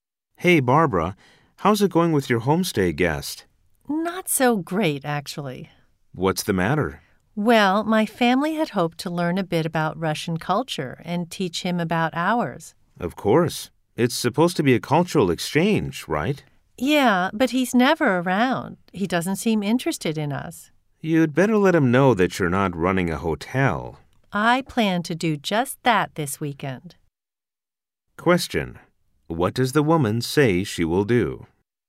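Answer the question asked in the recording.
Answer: Talk to her homestay guest this weekend and tell him that they are not running a hotel.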